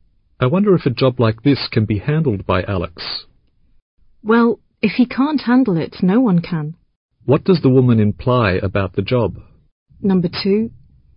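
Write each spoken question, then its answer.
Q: What does the woman imply about the job?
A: Alex is the best person to handle it; if he can't, no one can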